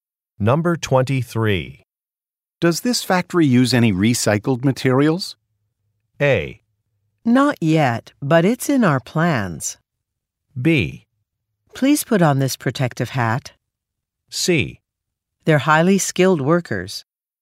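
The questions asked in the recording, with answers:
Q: Does this factory use any recycled materials?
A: A: Not yet, but it's in our plans.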